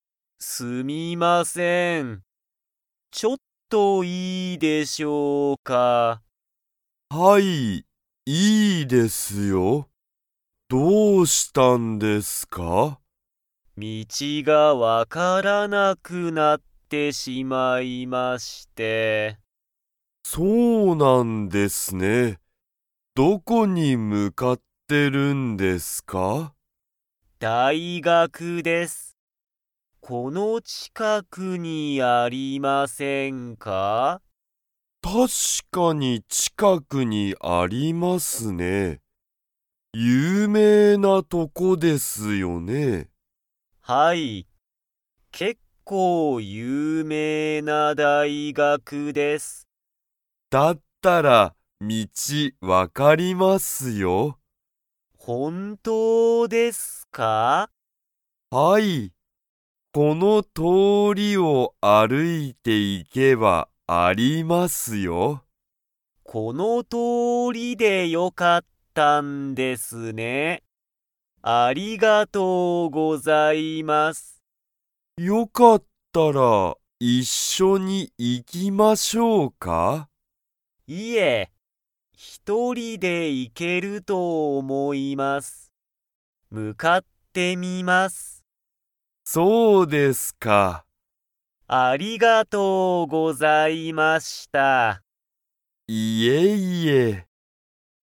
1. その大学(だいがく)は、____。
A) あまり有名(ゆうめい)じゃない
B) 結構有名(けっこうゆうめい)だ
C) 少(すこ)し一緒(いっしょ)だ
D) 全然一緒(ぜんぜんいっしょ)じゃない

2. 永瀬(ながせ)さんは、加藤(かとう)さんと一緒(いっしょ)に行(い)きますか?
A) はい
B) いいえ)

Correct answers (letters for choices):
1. B
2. B

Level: Level 2